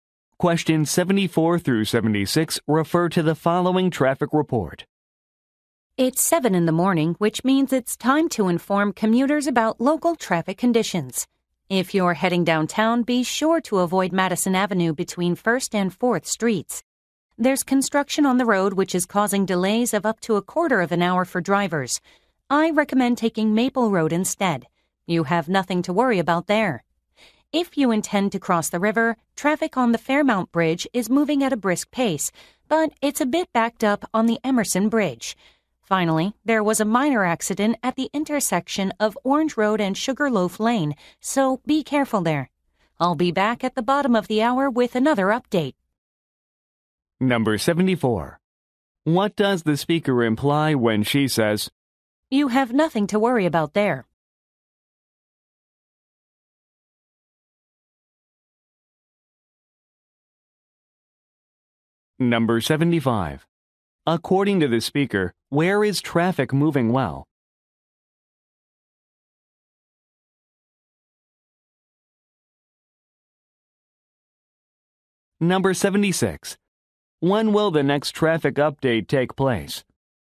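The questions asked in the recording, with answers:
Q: What does the speaker imply when she says,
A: There are no traffic delays on Maple Road

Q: According to the speaker, where is traffic moving well?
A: On the Fairmount Bridge

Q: When will the next traffic update take place?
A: In half an hour (at the bottom of the hour)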